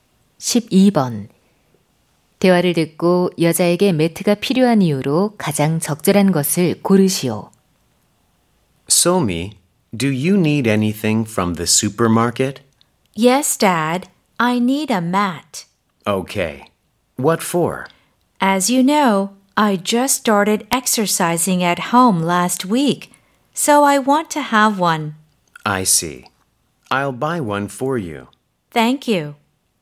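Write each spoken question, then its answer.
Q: 대화를 듣고 여자에게 매트가 필요한 이유로 가장 적절한 것을 고르시오.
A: 집에서 운동을 시작해서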